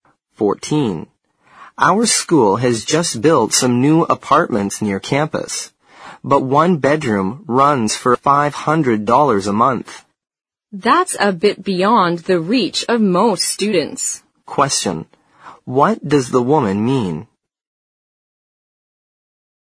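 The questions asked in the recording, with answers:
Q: what does the woman mean?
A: Most students can't afford the new apartments.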